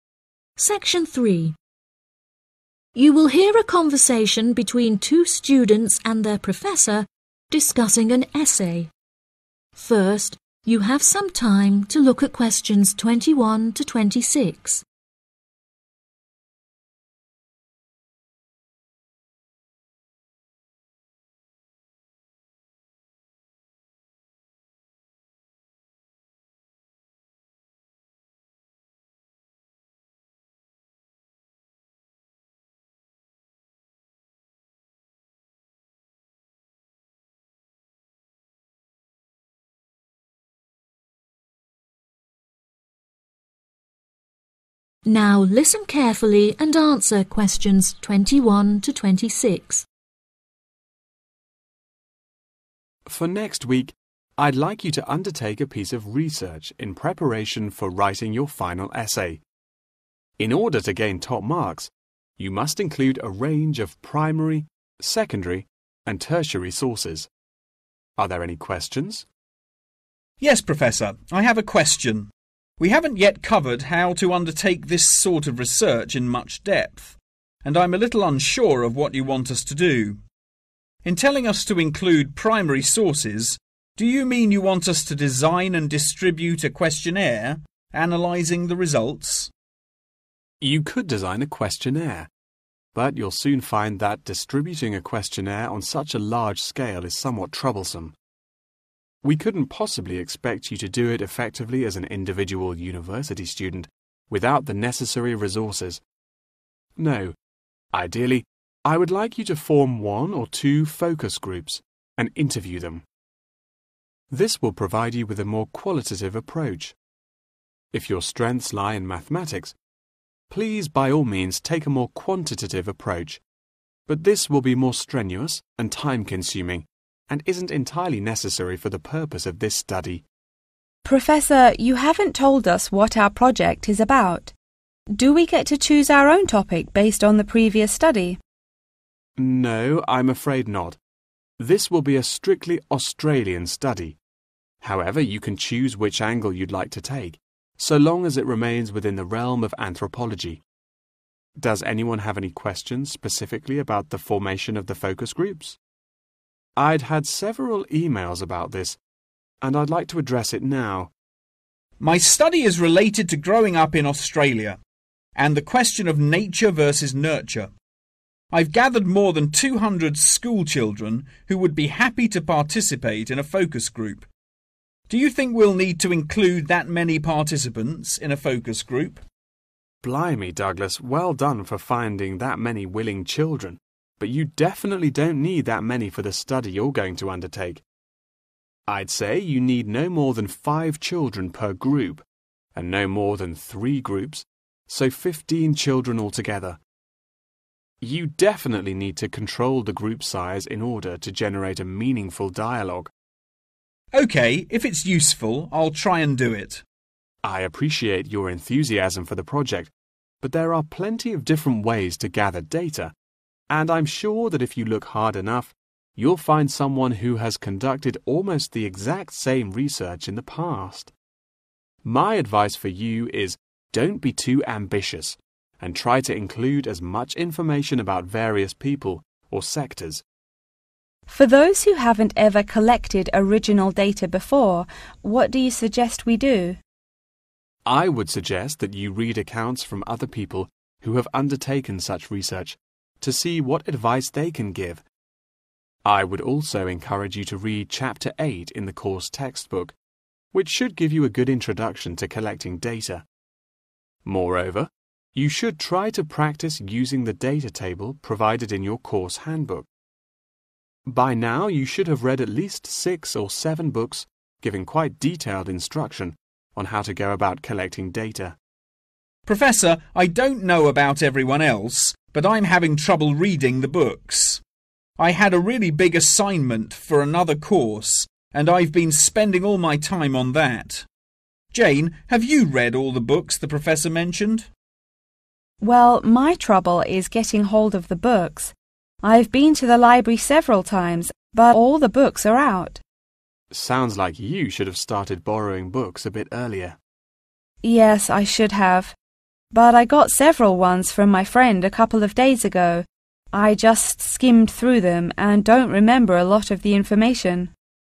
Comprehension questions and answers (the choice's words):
Choose the correct letter, A, B or C.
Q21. What kind of research method does the professor recommend?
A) interview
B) observation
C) questionnaire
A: interview

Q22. What is the project based on?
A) a study they did before in Australia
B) a similar angle someone has done before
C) an Australian study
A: an Australian study

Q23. What does the professor advise Douglas to do about the formation of the focus groups?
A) strengthen the group in size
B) reduce the number of children in each group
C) build more than 3 groups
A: reduce the number of children in each group

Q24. To do the project best, the professor suggests the students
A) interview various people or sectors.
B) not be too ambitious.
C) work hard enough.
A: not be too ambitious.

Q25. To gather data, the professor asks Jane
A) to replace other people's advice.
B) to simplify the textbook.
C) to practice using the date table.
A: to practice using the date table.

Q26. The reason why Douglas hasn't read enough reference books is that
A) he doesn't have enough time.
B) he thinks there are too many books to read.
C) he hasn't spent time in the library.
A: he doesn't have enough time.